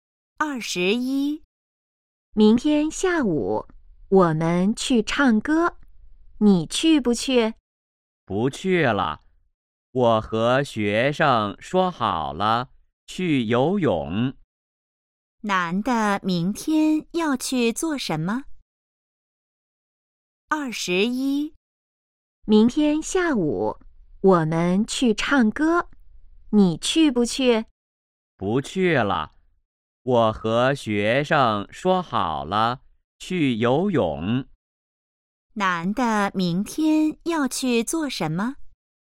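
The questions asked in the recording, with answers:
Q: 男的明天要去做什么?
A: 去游泳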